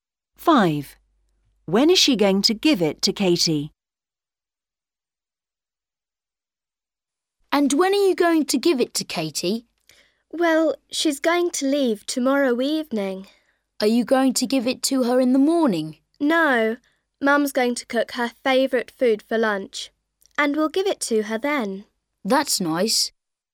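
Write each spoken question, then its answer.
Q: When is she going to give it to Katie?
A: at lunch (tomorrow)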